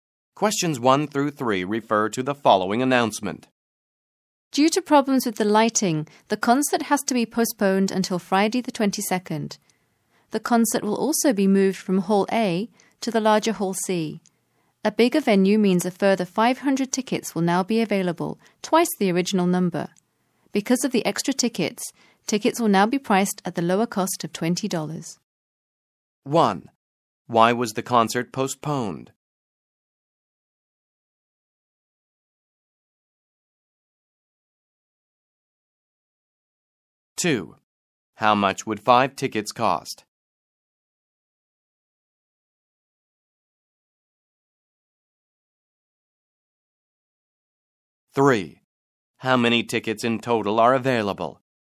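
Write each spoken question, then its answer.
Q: Why was the concert postponed?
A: Because of problems with the lighting

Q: How much would 5 tickets cost?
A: $100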